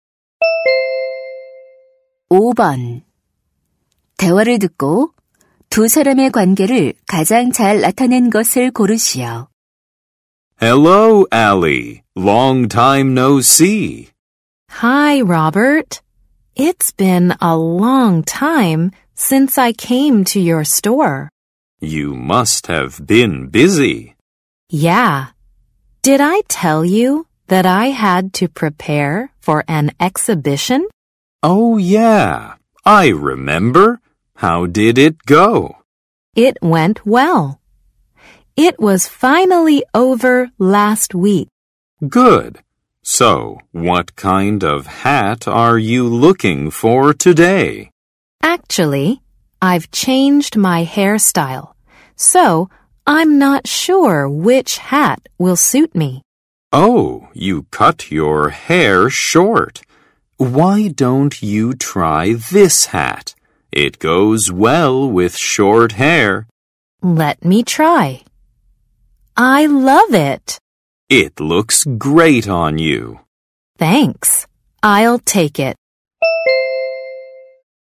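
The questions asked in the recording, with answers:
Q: 대화를 듣고 두 사람의 관계를 가장 잘 나타낸 것을 고르시오.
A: 모자 가게 점원과 손님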